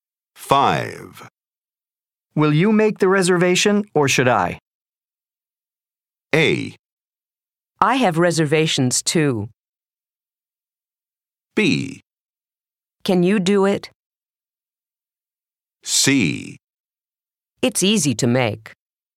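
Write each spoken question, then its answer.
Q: Will you make the reservation or should I?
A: B: Can you do it?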